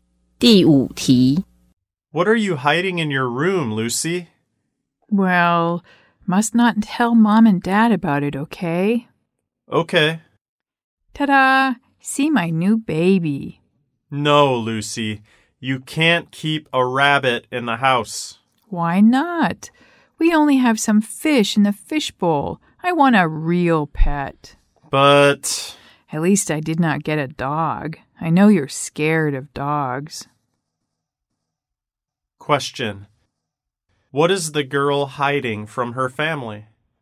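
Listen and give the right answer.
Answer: A rabbit.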